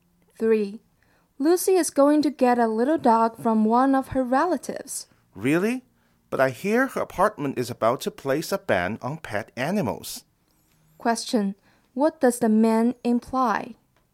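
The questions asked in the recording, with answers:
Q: What does the ban imply?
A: Lucy may not be allowed to keep the dog in her apartment.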